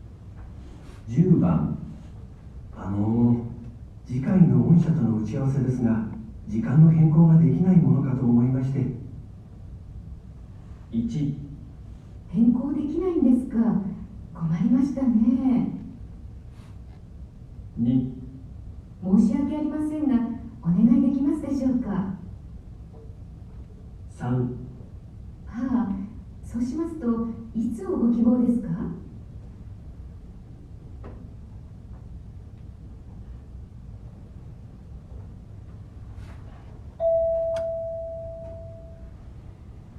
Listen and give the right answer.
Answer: 3

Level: N1 Listening · Test 2